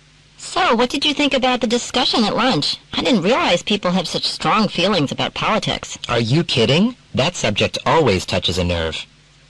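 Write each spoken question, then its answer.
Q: What does the man mean?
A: Politics is a sensitive subject that people always have strong feelings about.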